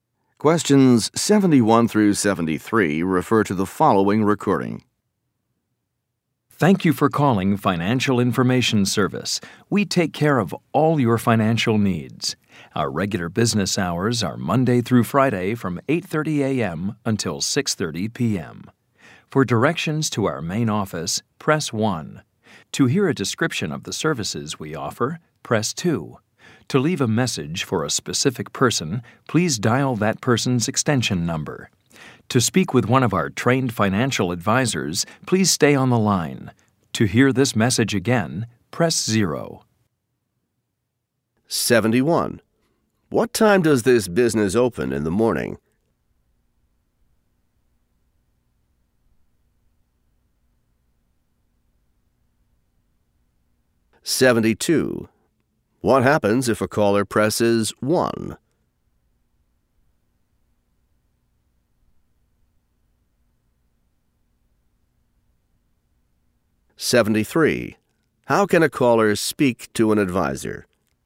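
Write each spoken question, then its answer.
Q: What time does this business open in the morning?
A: 8:30 a.m.

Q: What happens if a caller presses 1?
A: They get directions to the main office

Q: How can a caller speak to an advisor?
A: By staying on the line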